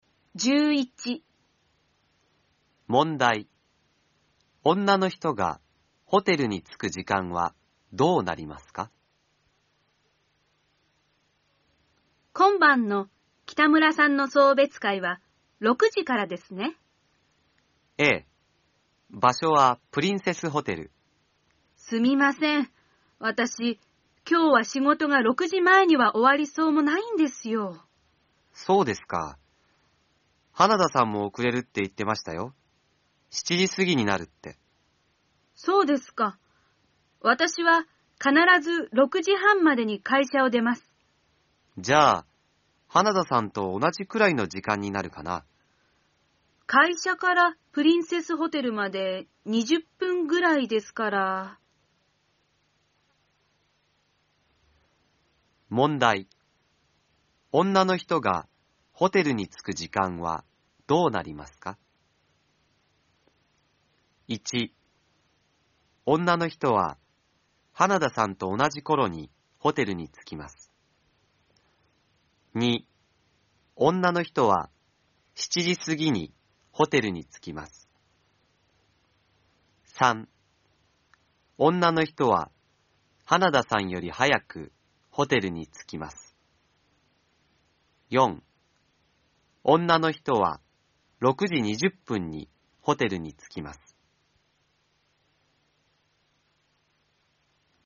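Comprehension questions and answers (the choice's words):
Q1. 女の人がホテルに着く時間は、どうなりますか。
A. 女の人は花田さんと同じころにホテルに着きます。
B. 女の人は7時すぎにホテルに着きます。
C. 女の人は花田さんより早くホテルに着きます。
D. 女の人は6時20分にホテルに着きます。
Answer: 女の人は花田さんより早くホテルに着きます。

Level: N4 ĐỀ 2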